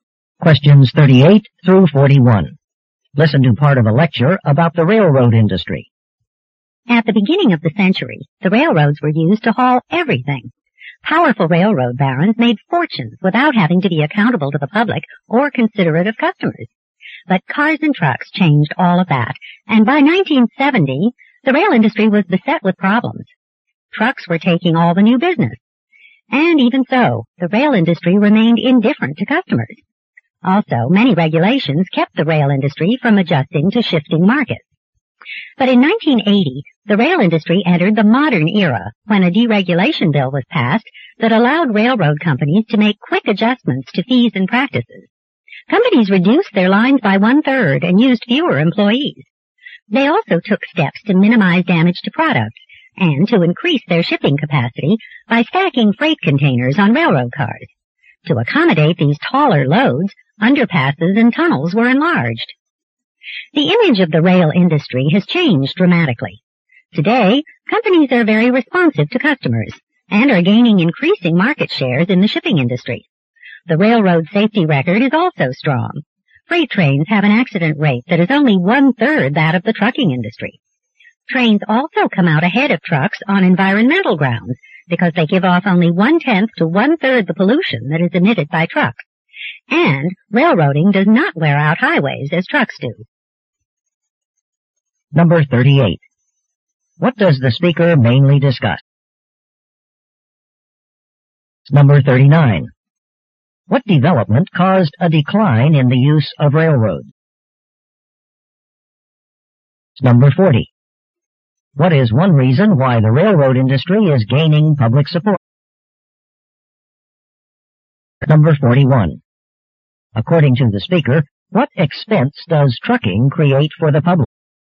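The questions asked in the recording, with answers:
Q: What does the speaker mainly discuss?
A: Changes in the railroad industry.

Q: What development caused a decline in the use of railroads?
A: The rise of cars and trucks.

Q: What is one reason why the railroad industry is gaining public support?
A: Its strong safety record and lower pollution.

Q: According to the speaker, what expense does trucking create for the public?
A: Wear on highways.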